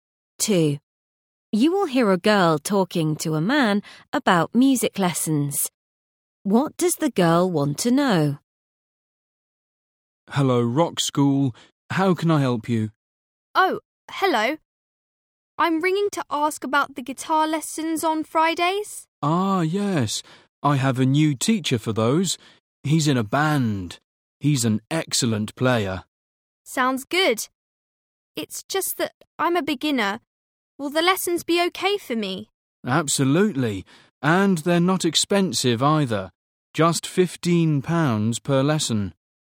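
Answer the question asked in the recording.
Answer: Whether the lessons are okay for a beginner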